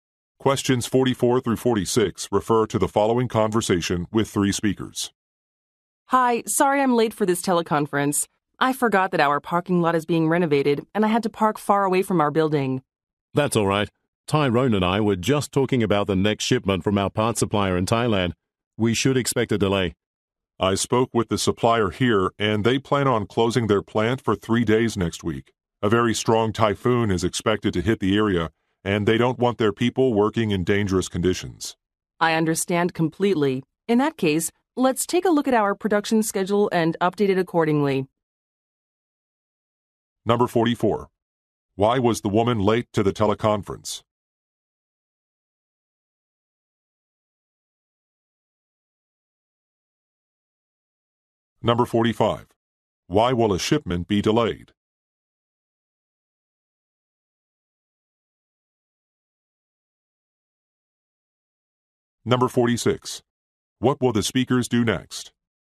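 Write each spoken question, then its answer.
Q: Why was the woman late to the teleconference?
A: The parking lot was being renovated, so she had to park far away

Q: Why will a shipment be delayed?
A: A typhoon will close the supplier's plant

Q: What will the speakers do next?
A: Update the production schedule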